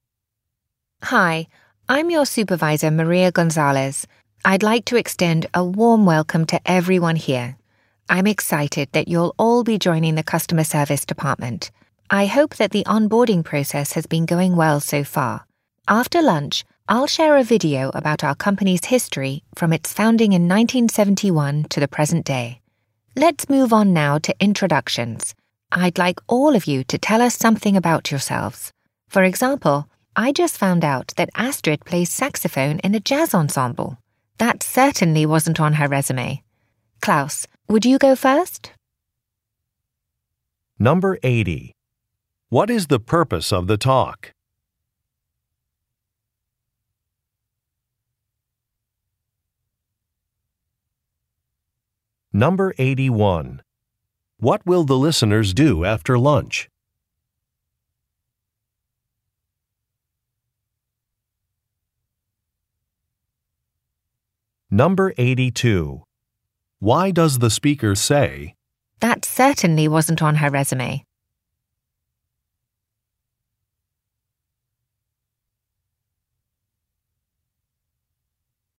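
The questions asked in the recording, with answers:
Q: What is the purpose of the talk?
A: To welcome new customer service employees during their orientation

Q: What will the listeners do after lunch?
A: Watch a video about the company's history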